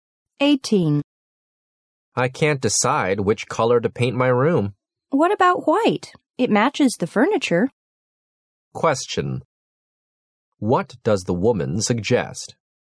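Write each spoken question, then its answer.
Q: What does the woman suggest?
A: Painting the room white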